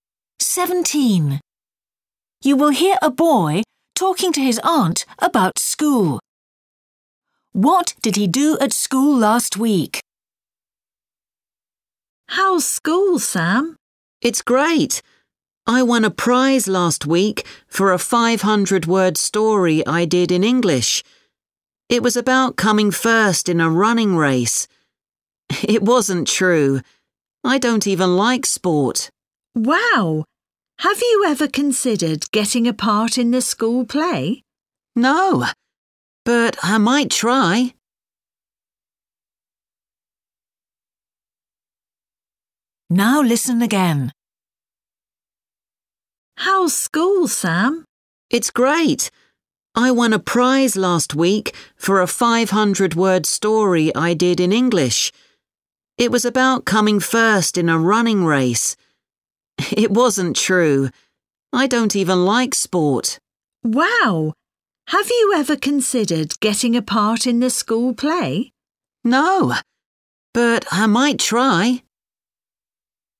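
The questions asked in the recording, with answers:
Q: What did he do at school last week?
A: He won a prize for a story he wrote in English.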